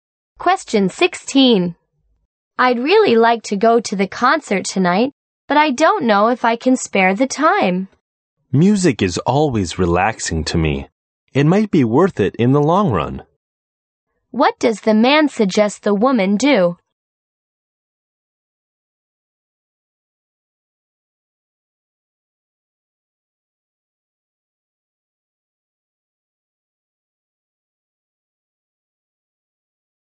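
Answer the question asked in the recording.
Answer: Go to the concert to relax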